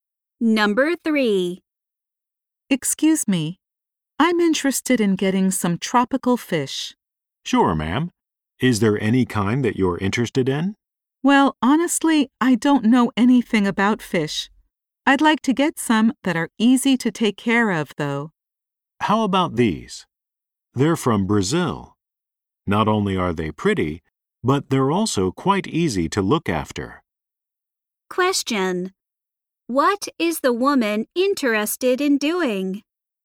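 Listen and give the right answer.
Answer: Buying tropical fish that are easy to take care of.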